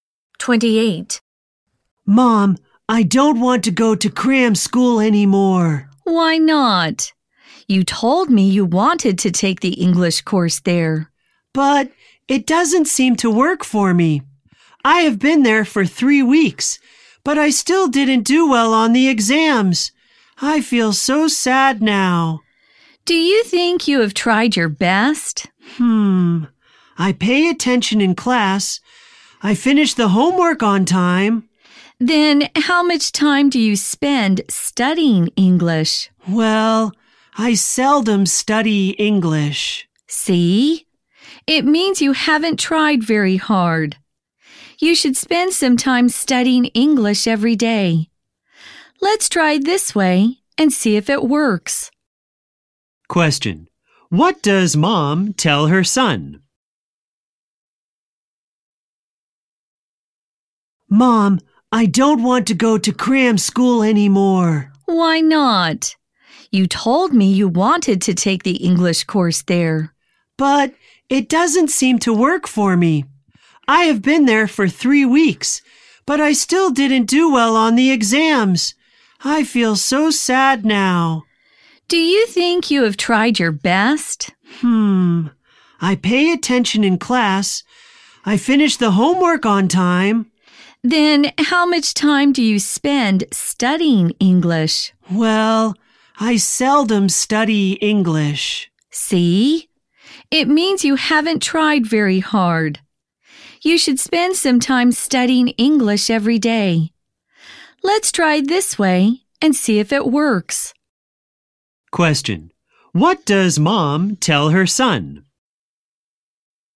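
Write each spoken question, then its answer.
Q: Question. What does Mom tell her son?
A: He should spend some time studying English every day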